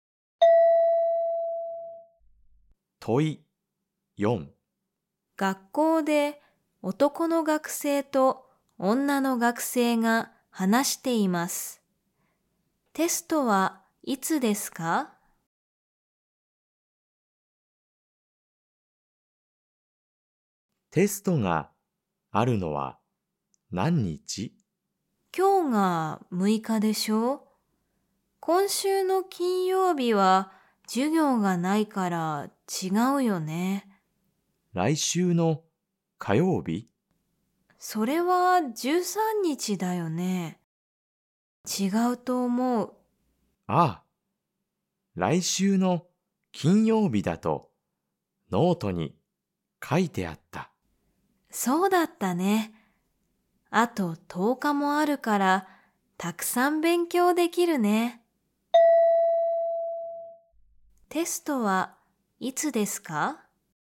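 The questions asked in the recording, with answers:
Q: テストはいつですか?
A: 来週の金曜日(16日)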